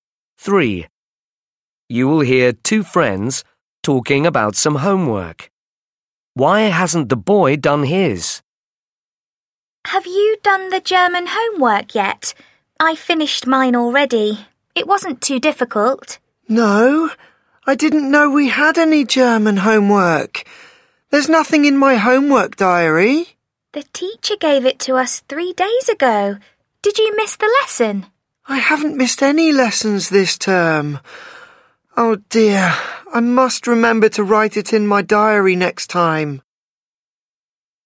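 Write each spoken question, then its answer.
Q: Why hasn't the boy done his?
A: He didn't write it in his homework diary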